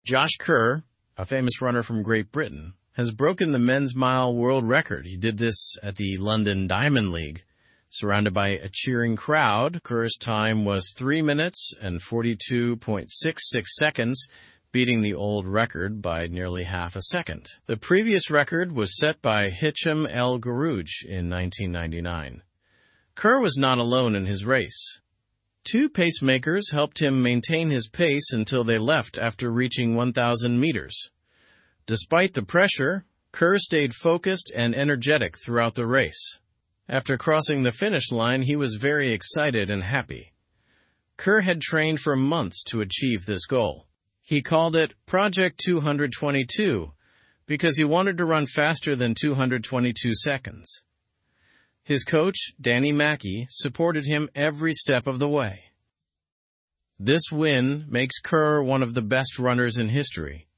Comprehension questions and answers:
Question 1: Who broke the men's mile world record?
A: Josh Kerr broke the men's mile world record.

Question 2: Where did Josh Kerr set this new record?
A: He set the new record at the London Diamond League.

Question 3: How long did it take Kerr to run the mile?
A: It took him three minutes and 42.66 seconds.

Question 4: Who helped Kerr maintain his pace during the race?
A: Two pacemakers helped him maintain his pace.

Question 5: What was the old record time for the men's mile?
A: The old record was nearly half a second longer.

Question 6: What name did Kerr give his training project?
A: He called it 'Project 222'.

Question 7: Who was Kerr's coach?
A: Danny Mackey was his coach.

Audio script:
Josh Kerr, a famous runner from Great Britain, has broken the men's mile world record. He did this at the London Diamond League, surrounded by a cheering crowd. Kerr's time was three minutes and 42.66 seconds, beating the old record by nearly half a second. The previous record was set by Hicham El Guerrouj in 1999.
Kerr was not alone in his race. Two pacemakers helped him maintain his pace until they left after reaching 1,000 meters. Despite the pressure, Kerr stayed focused and energetic throughout the race. After crossing the finish line, he was very excited and happy.
Kerr had trained for months to achieve this goal. He called it 'Project 222' because he wanted to run faster than 222 seconds. His coach, Danny Mackey, supported him every step of the way. This win makes Kerr one of the best runners in history.

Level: Level 2